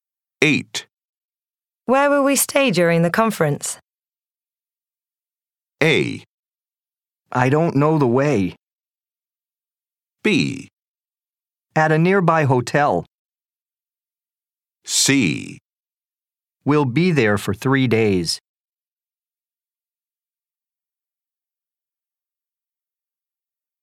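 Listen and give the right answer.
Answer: B: At a nearby hotel.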